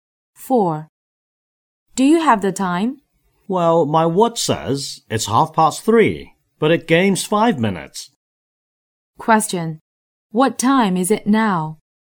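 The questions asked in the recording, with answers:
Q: What time is it now?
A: 3:25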